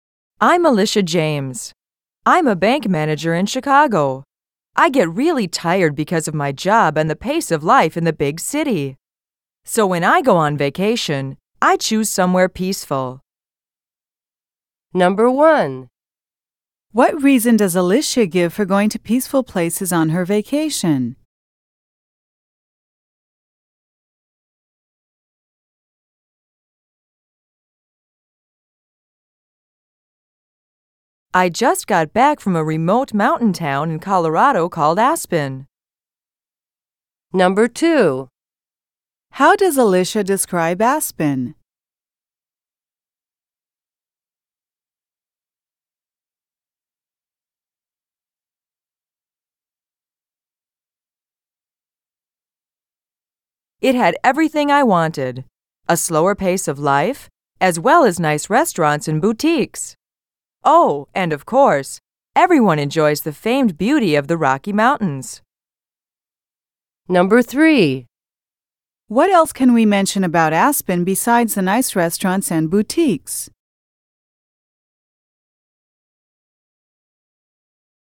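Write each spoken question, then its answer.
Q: What reason does Alicia give for going to peaceful places on her vacation?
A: She gets really tired from her job and the pace of life in the big city.

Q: How does Alicia describe Aspen?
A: It is a remote mountain town in Colorado.

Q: What else can we mention about Aspen besides the nice restaurants and boutiques?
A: It has a slower pace of life and the famed beauty of the Rocky Mountains.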